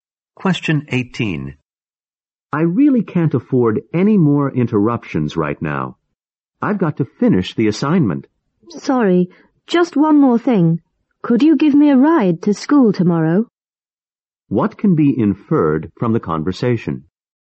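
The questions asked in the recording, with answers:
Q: What can be inferred from the conversation?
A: The woman is busy with an assignment, but the man interrupts her to ask for a ride.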